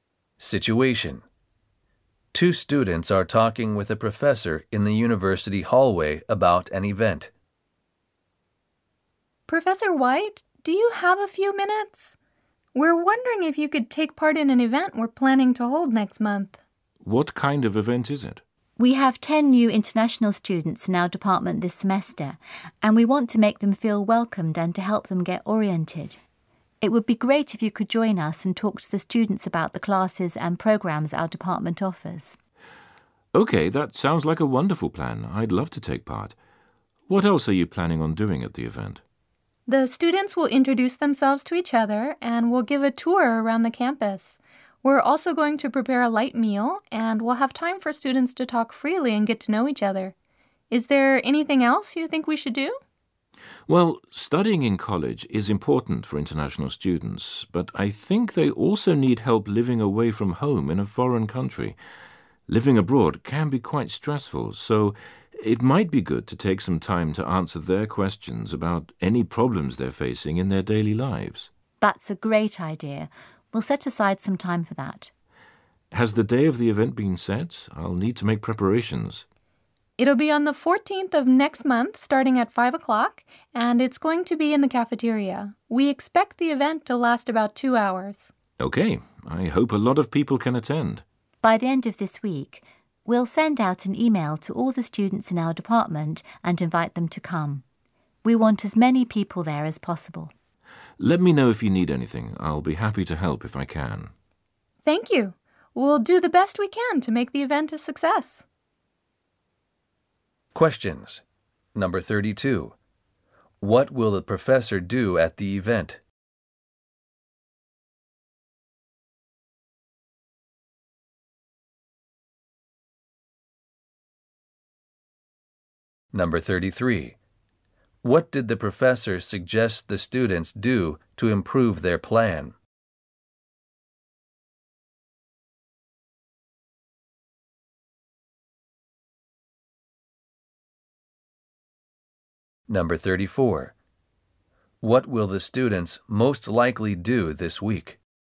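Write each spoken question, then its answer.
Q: What will the professor do at the event?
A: Talk to the students about the department's classes and programs

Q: What did the professor suggest the students do to improve their plan?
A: Take time to answer international students' questions about problems in their daily lives

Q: What will the students most likely do this week?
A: Send an email inviting all the department's students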